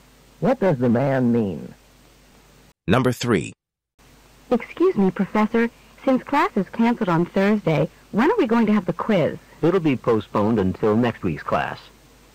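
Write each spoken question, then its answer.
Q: What does the man mean?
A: The quiz will be given in next week's class.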